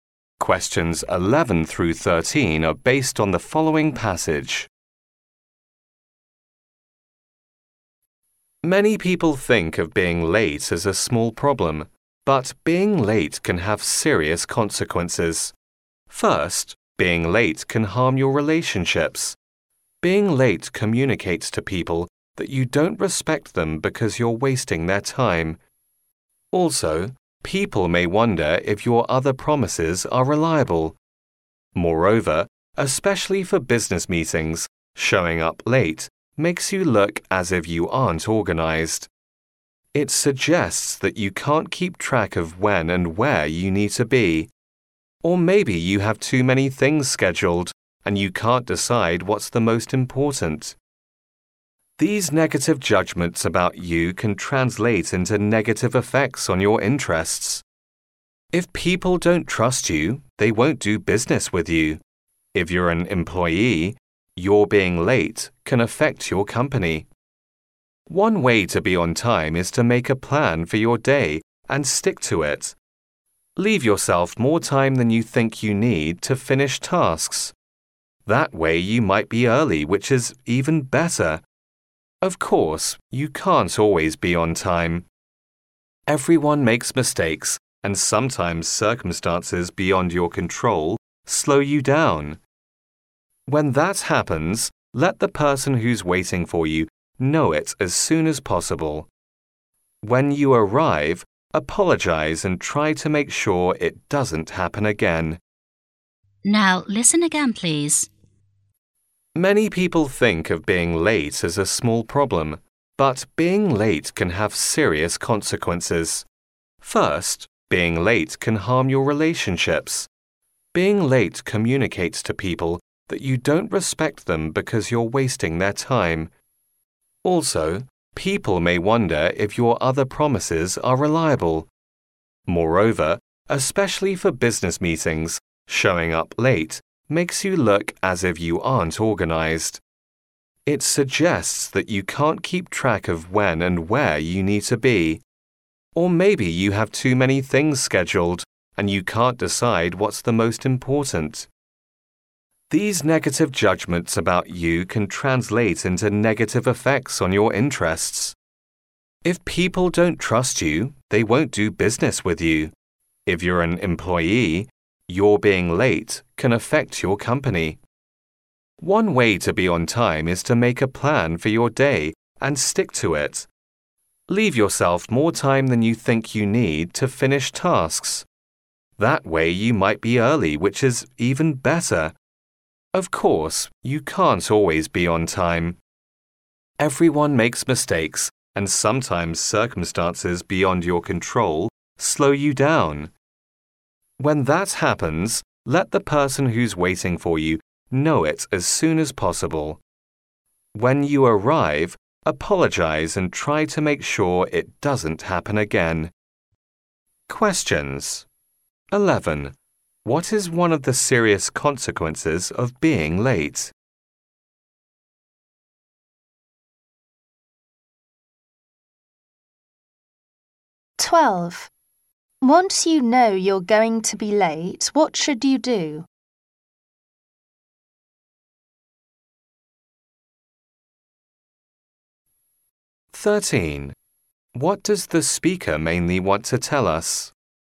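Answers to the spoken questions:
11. It can harm your relationships
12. Let the person waiting know as soon as possible
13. Being late can have serious consequences, so we should be on time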